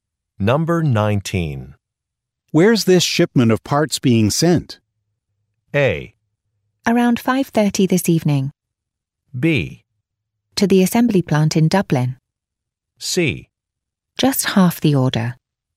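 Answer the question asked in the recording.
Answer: B: To the assembly plant in Dublin.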